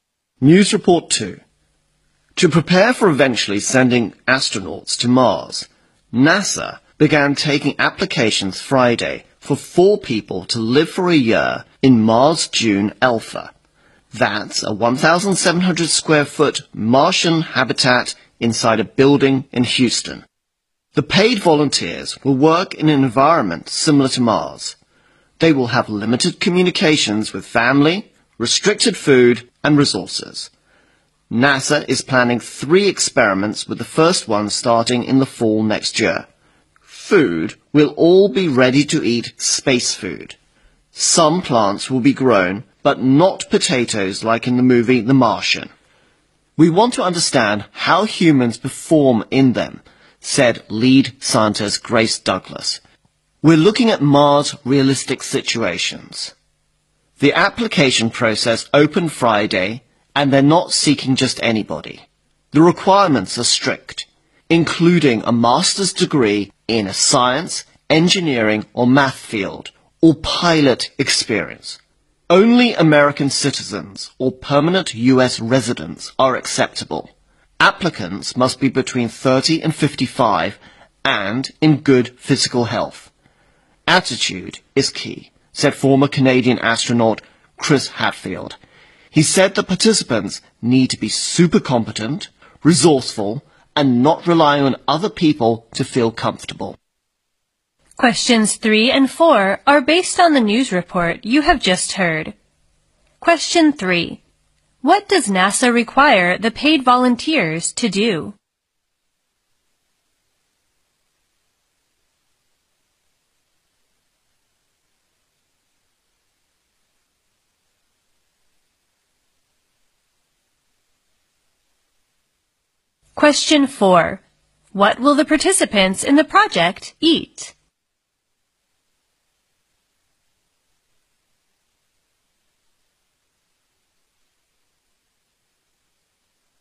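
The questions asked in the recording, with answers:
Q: What does NASA require the paid volunteers to do?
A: Live and work for a year in a simulated Mars environment.

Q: What will the participants in the project eat?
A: Ready-to-eat space food.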